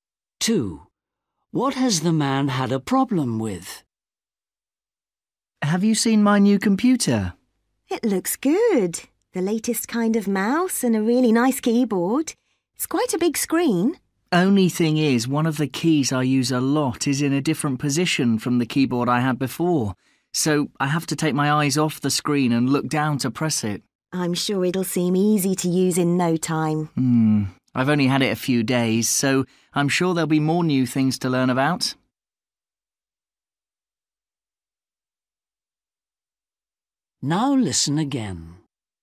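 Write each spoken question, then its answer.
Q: What has the man had a problem with?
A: the position of a key on the keyboard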